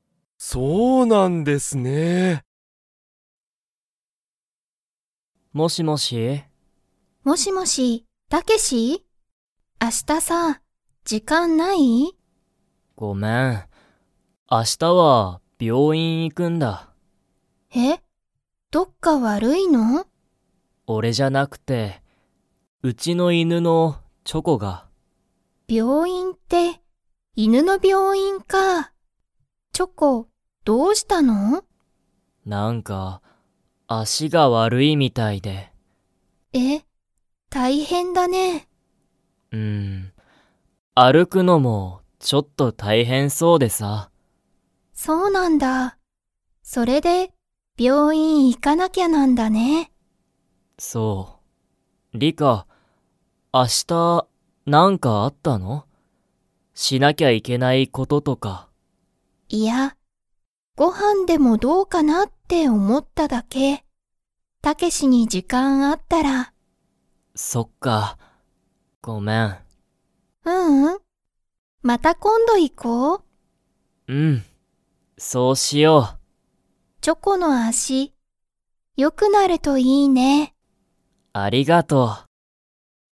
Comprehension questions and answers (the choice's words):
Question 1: チョコは____。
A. 足あしが悪わるいみたいだ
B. 明日時間あしたじかんがない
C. 病院びょういんに行いきたくない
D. 歩あるくのが好すきだ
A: 足あしが悪わるいみたいだ

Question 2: タケシとリカは明日あしたご飯はんを食たべに行いきますか?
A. はい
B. いいえ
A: いいえ

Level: Level 2